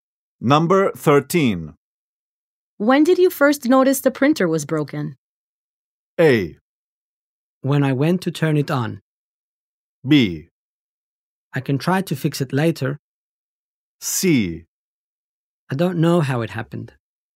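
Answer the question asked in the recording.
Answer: A: When I went to turn it on.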